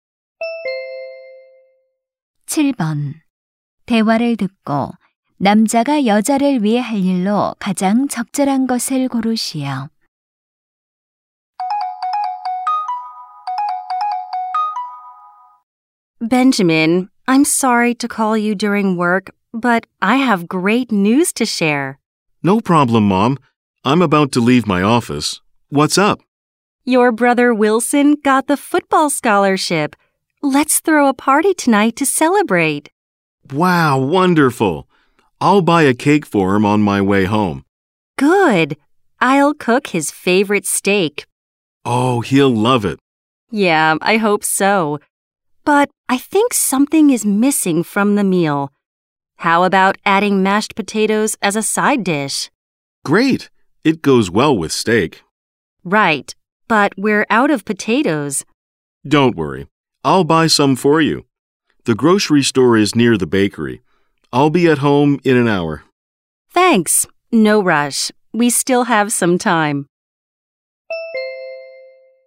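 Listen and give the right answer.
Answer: 감자 사 오기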